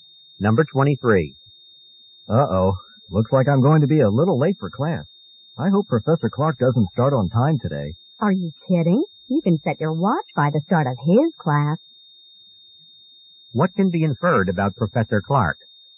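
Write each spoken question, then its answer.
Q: What can be inferred about Professor Clark?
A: He always starts class on time.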